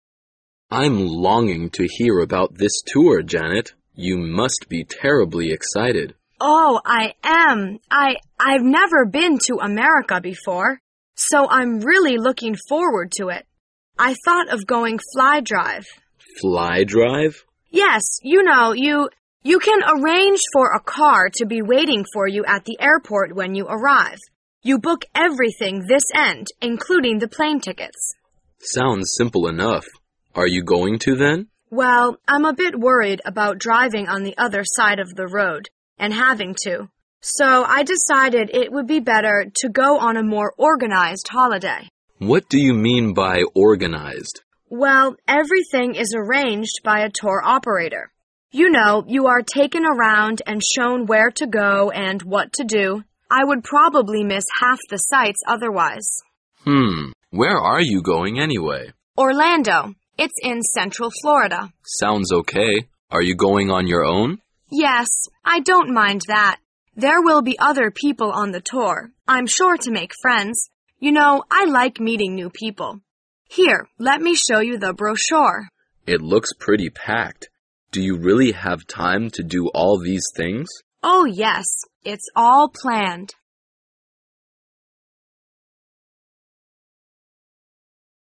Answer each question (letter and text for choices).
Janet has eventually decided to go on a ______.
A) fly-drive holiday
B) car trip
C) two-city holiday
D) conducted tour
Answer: D) conducted tour

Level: 专业四级